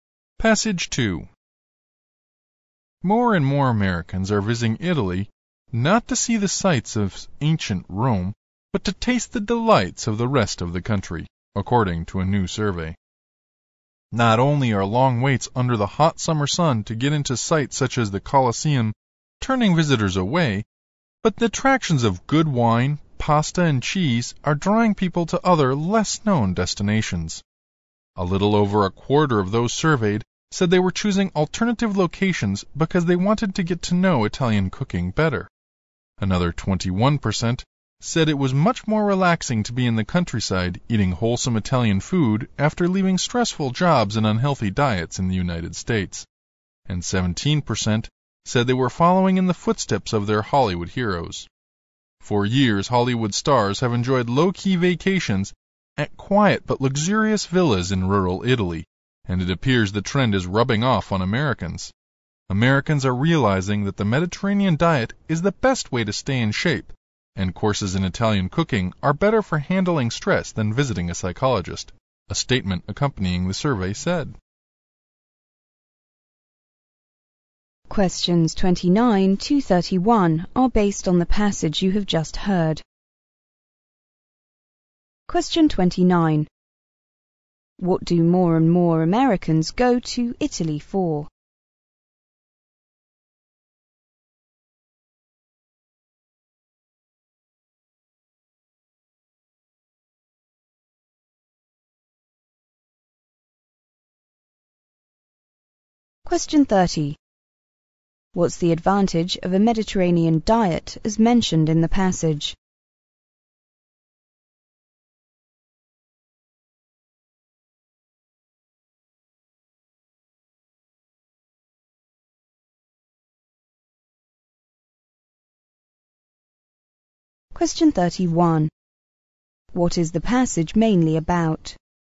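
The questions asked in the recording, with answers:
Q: What do more and more Americans go to Italy for?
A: To enjoy Italian food and the countryside

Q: What's the advantage of a Mediterranean diet as mentioned in the passage?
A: It is the best way to stay in shape

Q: What is the passage mainly about?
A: A new trend of Americans visiting Italy for food rather than ancient sights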